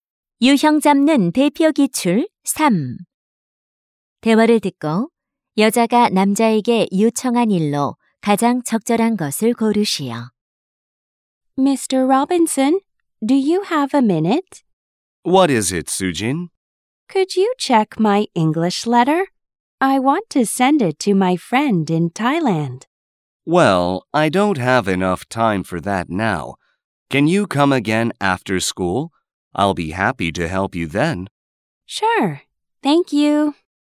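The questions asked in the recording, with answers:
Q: 대화를 듣고 여자가 남자에게 요청한 일로 가장 적절한 것을 고르시오.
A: 영어 편지 확인해 주기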